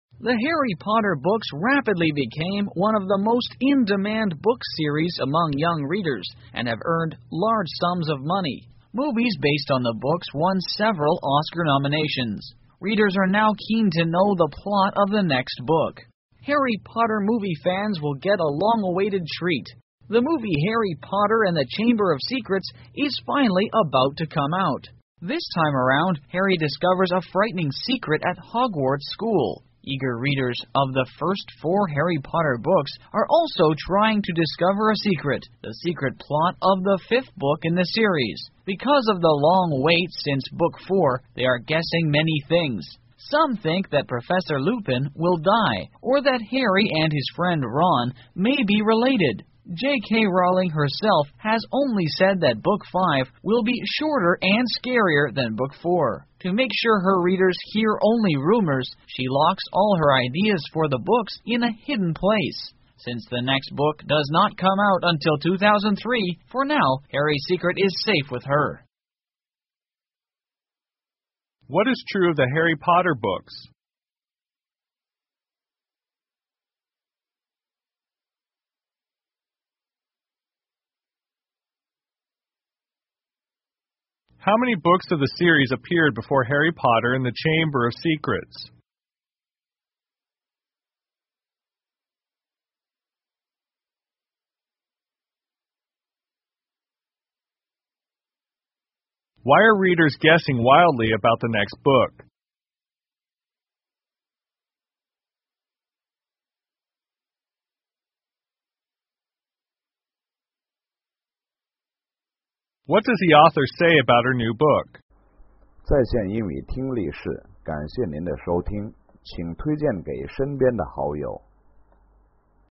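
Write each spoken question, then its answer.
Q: What is true of the Harry Potter books?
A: They became very popular with young readers and have earned large sums of money.

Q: Why are readers guessing wildly about the next book?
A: Because of the long wait since book four.

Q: What does the author say about her new book?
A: It will be shorter and scarier than Book 4.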